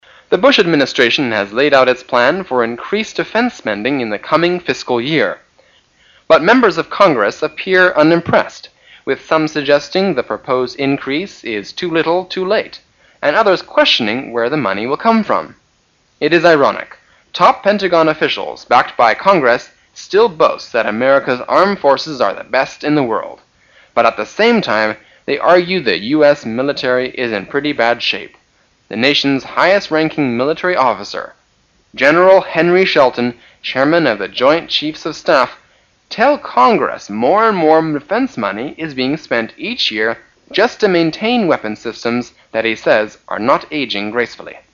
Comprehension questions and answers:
Questions 27~28 are based on the following news from the BBC or the VOA. At the end of the news item, you will be given 10 seconds to answer the two questions. Now listen to the news.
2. Who is Henry Shelton?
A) The Defense Minister.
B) The Secretary of State,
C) Chairman of the Congress.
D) Chairman of the Joint chiefs of staff.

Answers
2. D

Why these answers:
答案可从"The nation's highest-ranking military officer, General Henry Shelton,chairman of the Joint Chiefs of Staff"看出。

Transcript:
[解析] 27-28 The Bush administration has laid out its plans for increased defense spending in the coming fiscal year. But members of Congress appear unimpressed, with some suggesting the proposed increase is too little, too late, and others questioning where the money will come from. It is ironic. Top Pentagon officials, backed by Congress, still boast that America' s armed forces are the best in the world. But at the same time, they argue the US military is in pretty sad shape. The nation' s highest-ranking military officer, General Henry Shelton, chairman of the Joint Chiefs of Staff, tells Congress more and more defense money is being spent each year just to maintain weapons systems that he says are not aging gracefully.

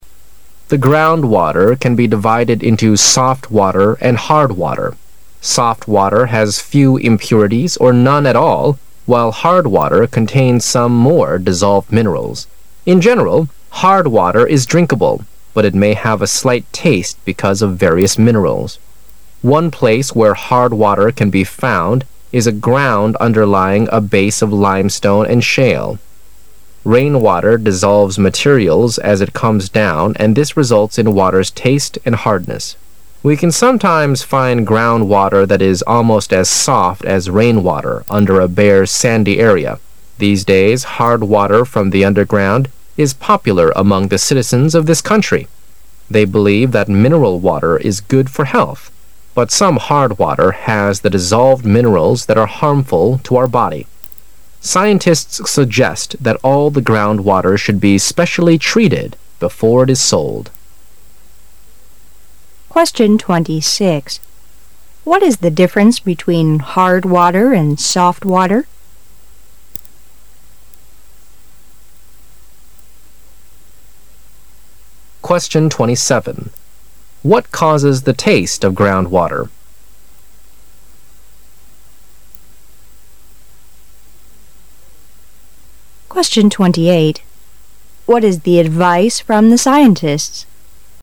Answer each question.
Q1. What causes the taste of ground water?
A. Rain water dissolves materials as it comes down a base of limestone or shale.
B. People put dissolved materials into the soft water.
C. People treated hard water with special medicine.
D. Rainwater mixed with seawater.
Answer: A

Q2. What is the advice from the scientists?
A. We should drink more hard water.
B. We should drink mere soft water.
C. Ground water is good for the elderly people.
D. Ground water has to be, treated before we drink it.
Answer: D

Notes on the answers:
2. 事实细节题。从"Scientists suggest that all the ground water should be specially treated before it is sold. "可知,科学家建议地表水必须在经过处理后才能饮用。

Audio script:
[解析] 26-28 The ground water can be divided into "soft water" and "hard water". Soft water has few impurities or none at all while hard water contains some more dissolved minerals. In general, hard water is drinkable, but it may have a slight taste because of various minerals. One place where hard water can be found is a ground underlying a base of limestone and shale. Rainwater dissolves materials as it comes down and this results in water's taste and hardness. We can sometimes find ground water that is almost as soft as rainwater under a bare sandy area. These clays hard water from the underground is popular among the citizens of this country. They believe that mineral water is good for health, but some hard water has the dissolved minerals that are harmful to our body. Scientists suggest that all the ground water should be specially treated before, it is sold. What is the difference between bard water and soft water?

